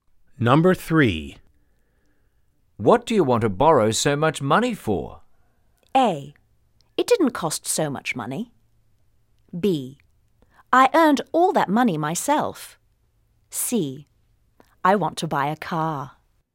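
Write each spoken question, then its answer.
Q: What do you want to borrow so much money for?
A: C: I want to buy a car.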